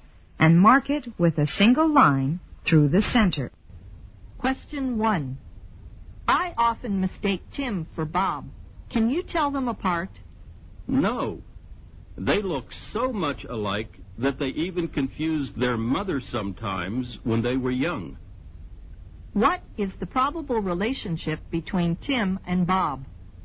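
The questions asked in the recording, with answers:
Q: What is the probable relationship between Tim and Bob?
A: They are probably twin brothers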